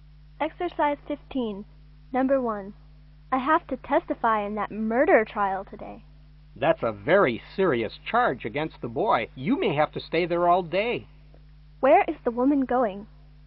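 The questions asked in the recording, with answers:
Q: Where is the woman going?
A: To court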